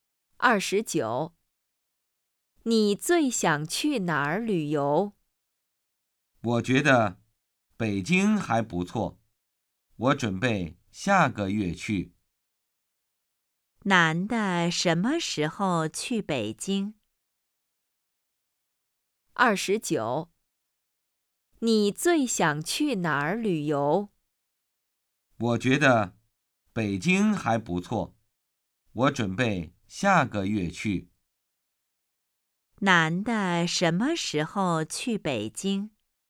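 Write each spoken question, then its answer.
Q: 男的什么时候去北京?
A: 下个月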